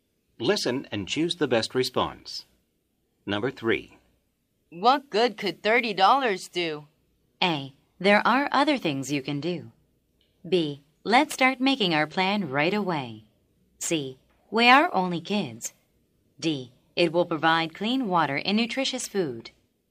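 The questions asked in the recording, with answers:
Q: What good could $30 do?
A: D: It will provide clean water and nutritious food.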